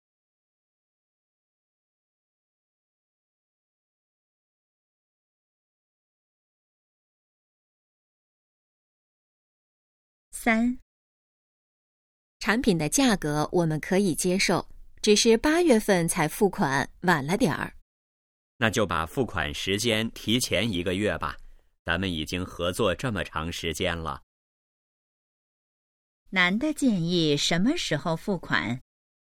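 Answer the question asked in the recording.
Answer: 7月份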